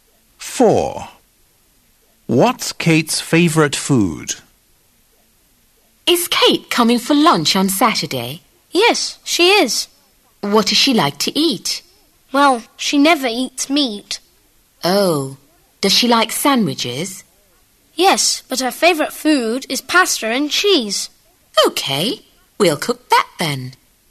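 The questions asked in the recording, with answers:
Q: What's Kate's favourite food?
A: pasta and cheese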